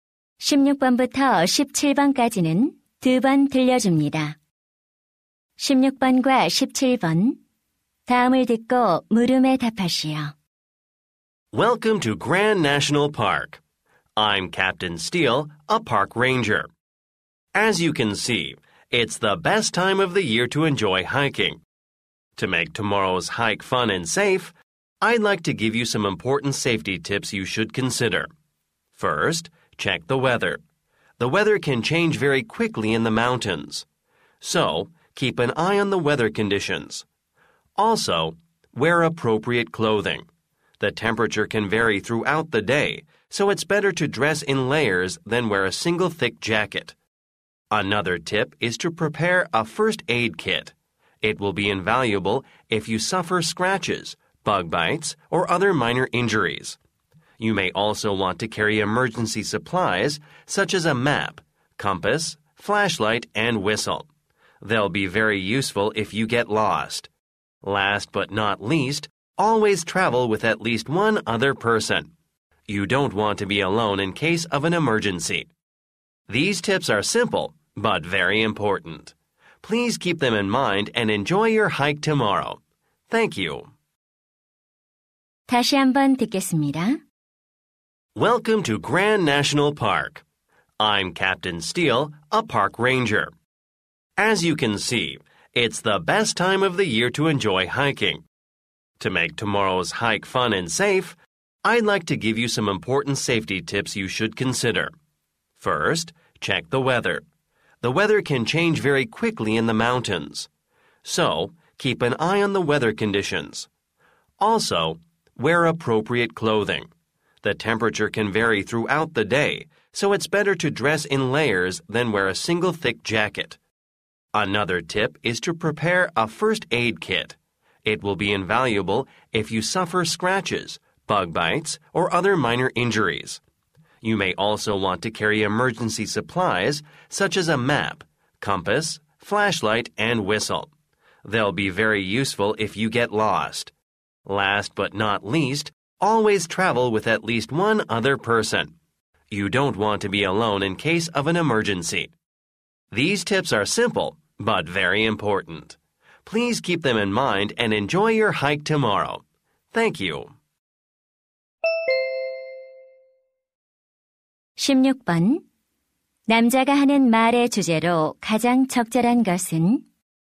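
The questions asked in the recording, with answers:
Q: 남자가 하는 말의 주제로 가장 적절한 것은?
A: 안전한 등산을 위한 유의 사항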